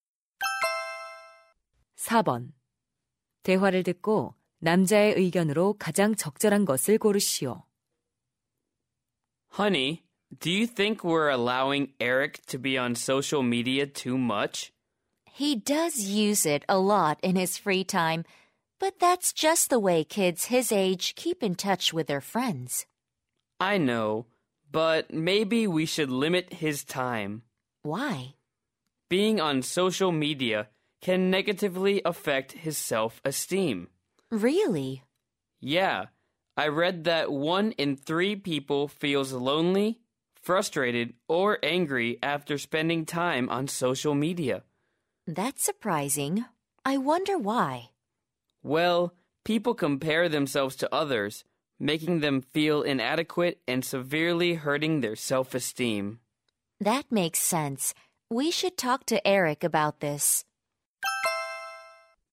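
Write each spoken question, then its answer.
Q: 대화를 듣고 남자의 의견으로 가장 적절한 것을 고르시오.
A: 소셜 미디어 사용은 자존감에 부정적인 영향을 줄 수 있다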